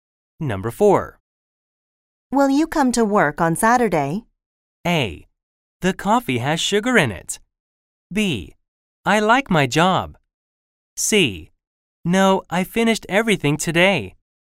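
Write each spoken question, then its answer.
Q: Will you come to work on Saturday?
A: C: No, I finished everything today.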